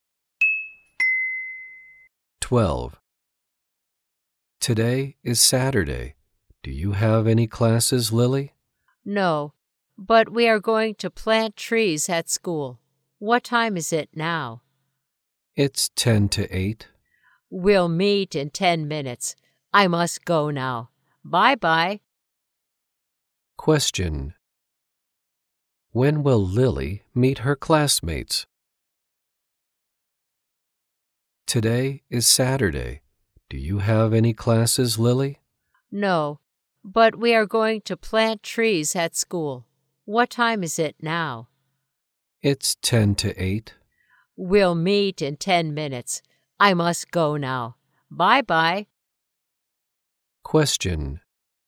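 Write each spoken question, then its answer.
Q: When will Lily meet her classmates?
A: At 8 o'clock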